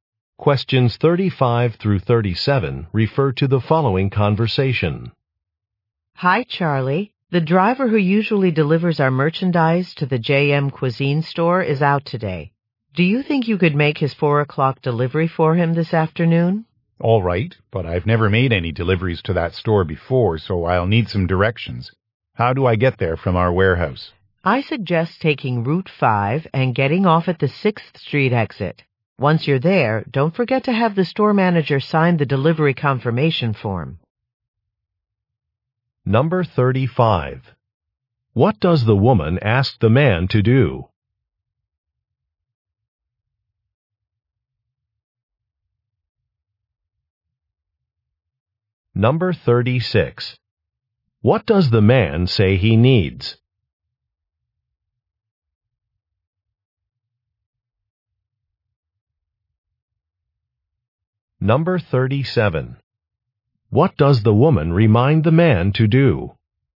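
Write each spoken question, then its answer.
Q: What does the woman ask the man to do?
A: Make a delivery to the JM Cuisine store

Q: What does the man say he needs?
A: Directions

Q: What does the woman remind the man to do?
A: Have the store manager sign the delivery confirmation form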